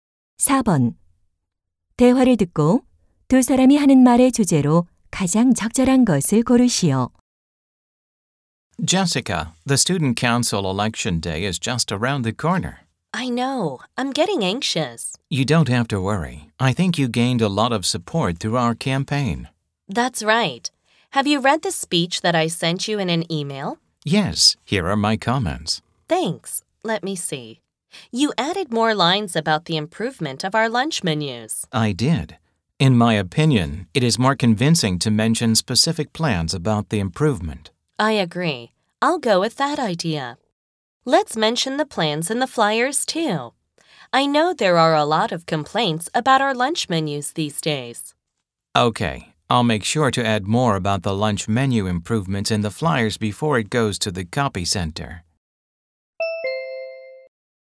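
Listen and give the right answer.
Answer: 선거 연설과 전단에 급식 메뉴 개선 계획을 구체적으로 넣기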